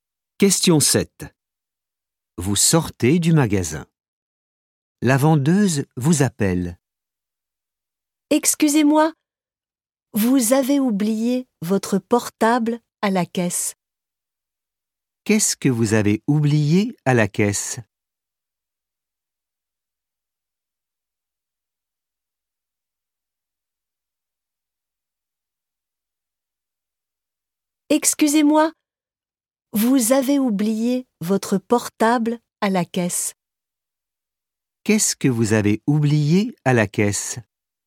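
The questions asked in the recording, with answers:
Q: Qu'est-ce que vous avez oublié à la caisse ?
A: Votre portable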